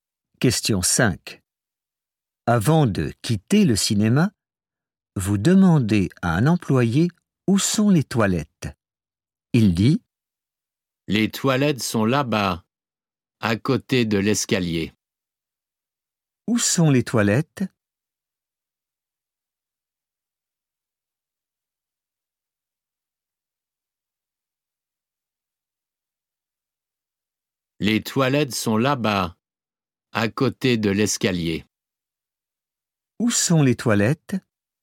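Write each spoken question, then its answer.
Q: Où sont les toilettes ?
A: À côté de l'escalier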